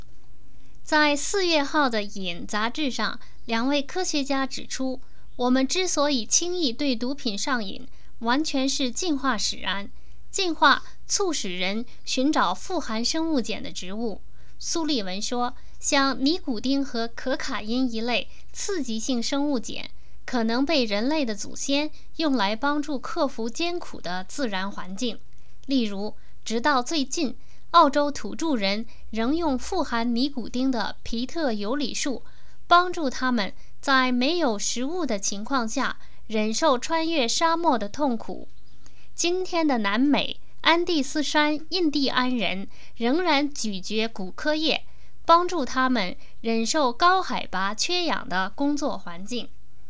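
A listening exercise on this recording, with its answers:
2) 为什么人类祖先使用毒品?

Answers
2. 帮助克服艰苦的自然环境,如忍受饥饿和高海拔缺氧

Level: 3rd Year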